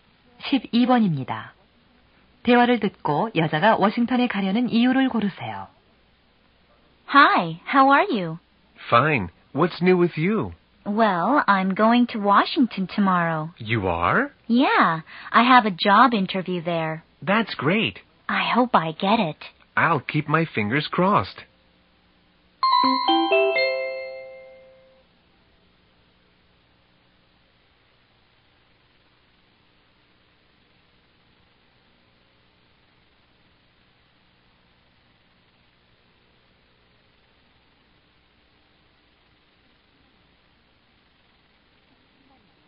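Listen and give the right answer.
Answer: 취업 면접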